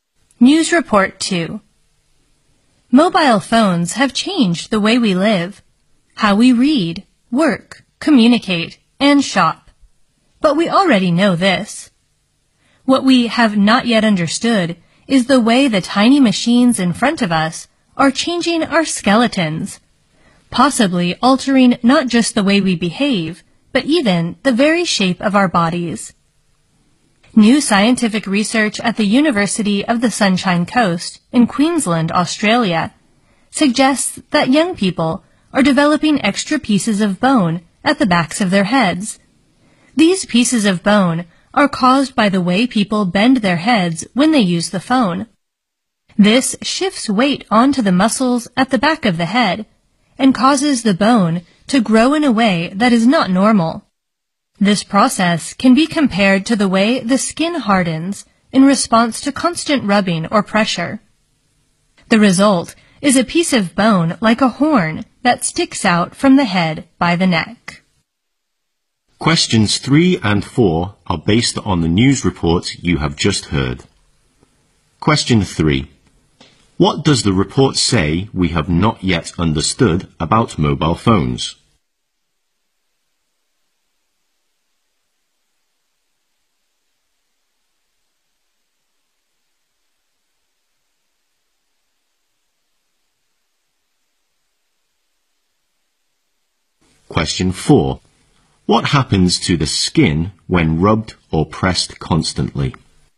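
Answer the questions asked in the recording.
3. How they are changing our skeletons, possibly the shape of our bodies.
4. It hardens.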